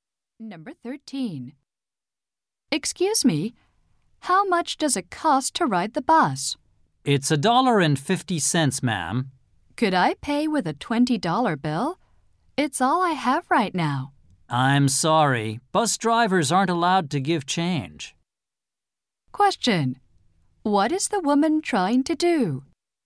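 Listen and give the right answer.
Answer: Pay for the bus with a $20 bill.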